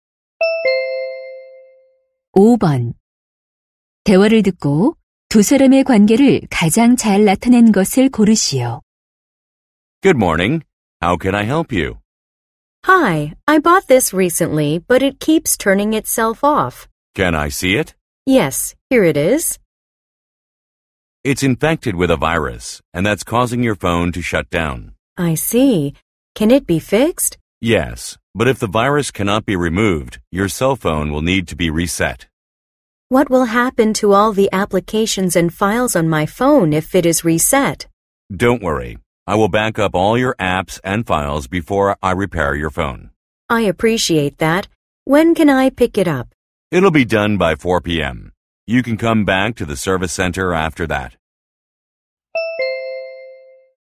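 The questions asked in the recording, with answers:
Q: 대화를 듣고 두 사람의 관계를 가장 잘 나타낸 것을 고르시오.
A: 고객 - 휴대전화 수리 기사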